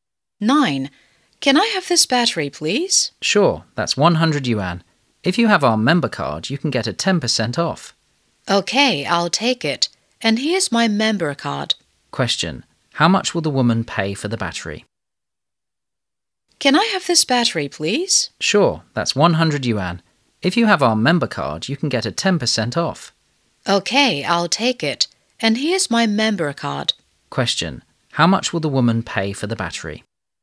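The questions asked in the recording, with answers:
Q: How much will the woman pay for the battery?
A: 90 yuan.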